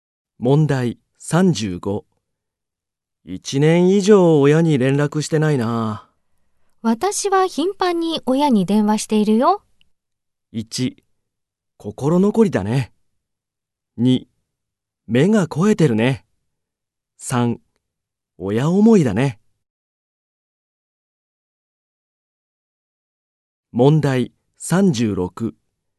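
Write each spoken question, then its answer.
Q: 1年以上親に連絡してないな。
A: 3: 親思いだね。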